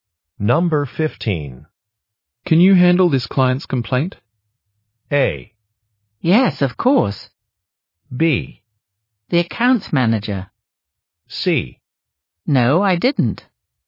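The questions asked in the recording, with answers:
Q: Can you handle this client's complaint?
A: A: Yes, of course.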